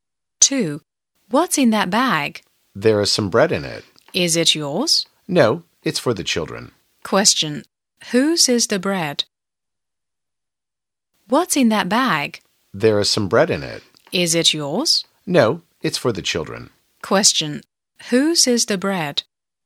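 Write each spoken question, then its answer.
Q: Whose is the bread?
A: The children's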